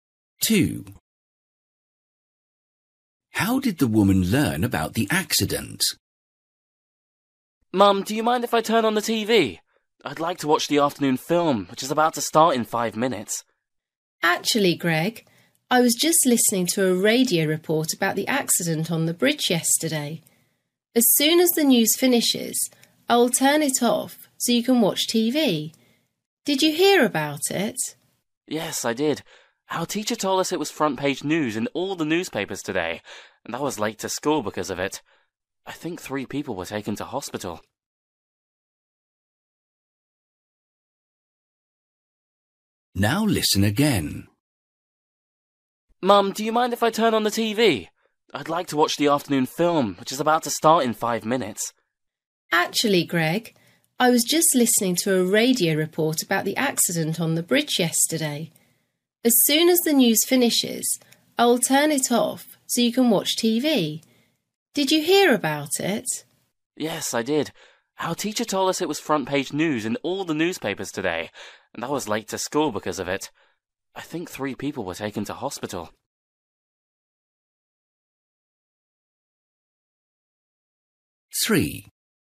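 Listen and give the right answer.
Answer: From a radio report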